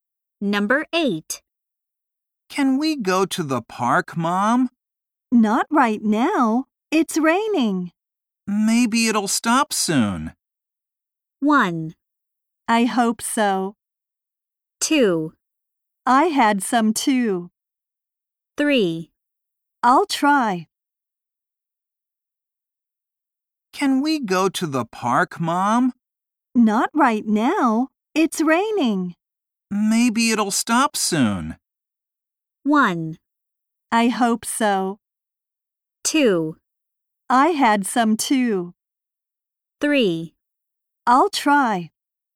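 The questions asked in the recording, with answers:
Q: Maybe it'll stop soon.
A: 1: I hope so.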